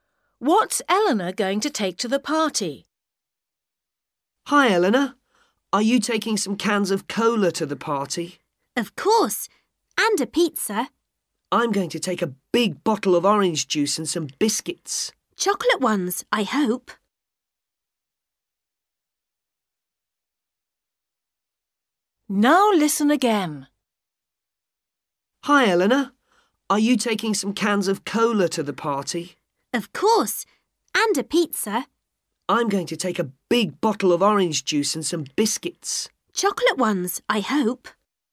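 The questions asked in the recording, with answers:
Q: What's Eleanor going to take to the party?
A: Cans of cola and a pizza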